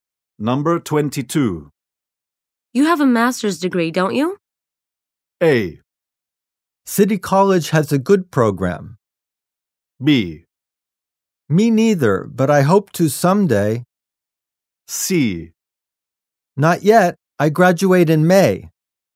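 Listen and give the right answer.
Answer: C: Not yet. I graduate in May.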